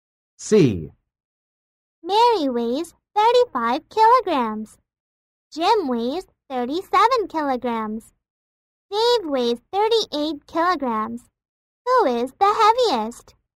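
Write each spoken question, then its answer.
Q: Who is the heaviest?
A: Dave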